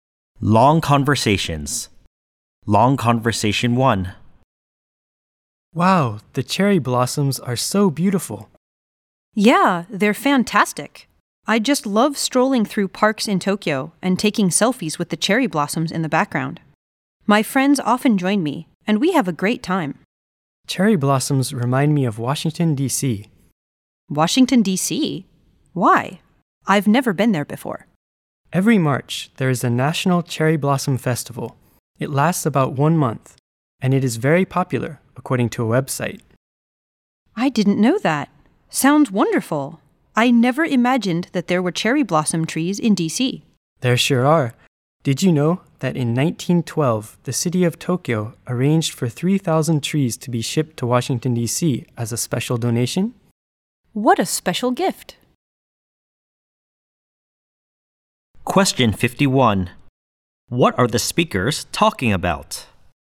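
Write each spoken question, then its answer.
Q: What are the speakers talking about?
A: Cherry blossoms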